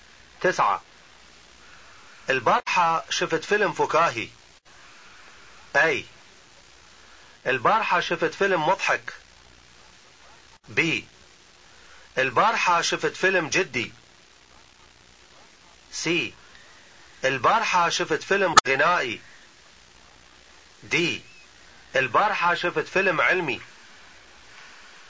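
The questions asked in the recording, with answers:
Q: تسعة. البارحة شفت فيلم فكاهي.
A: A: البارحة شفت فيلم مضحك.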